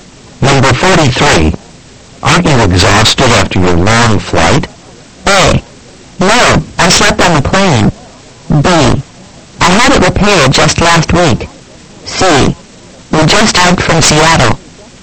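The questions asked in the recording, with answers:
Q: Aren't you exhausted after your long flight?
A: A: No, I slept on the plane.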